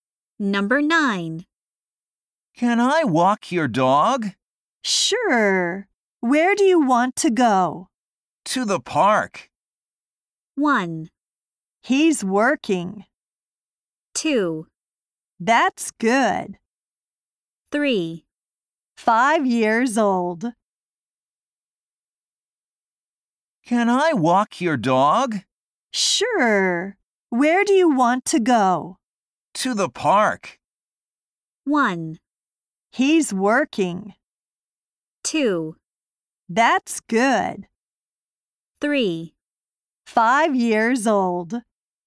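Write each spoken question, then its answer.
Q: To the park.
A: 2: That's good.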